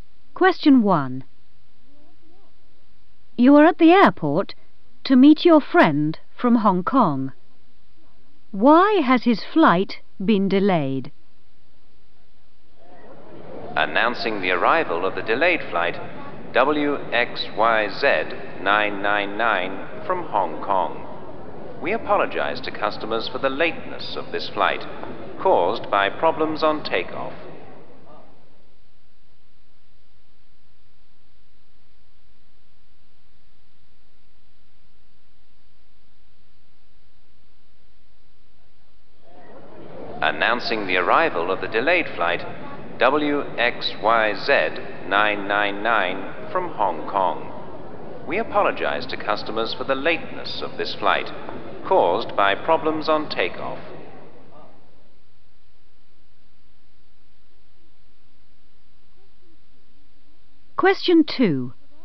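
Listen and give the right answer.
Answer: problems on takeoff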